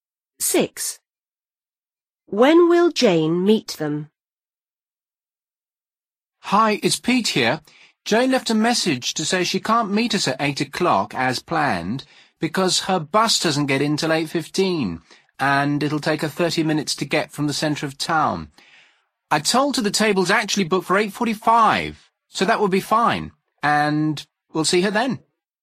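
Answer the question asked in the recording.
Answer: At 8:45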